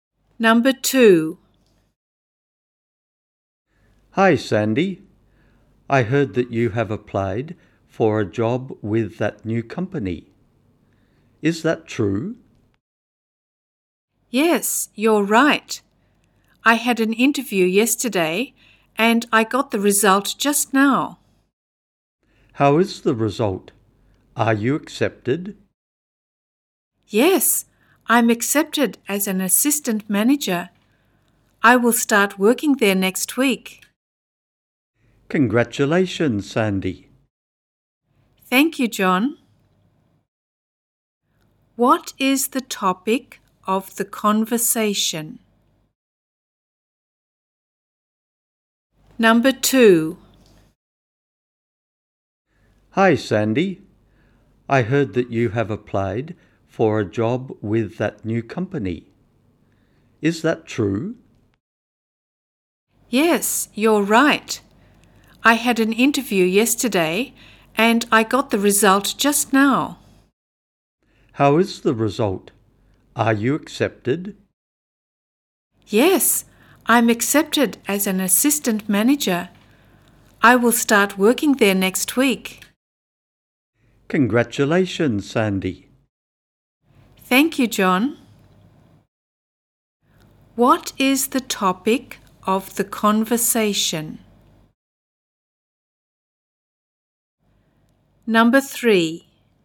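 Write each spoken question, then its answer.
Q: What is the topic of the conversation?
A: Sandy being accepted for a job as assistant manager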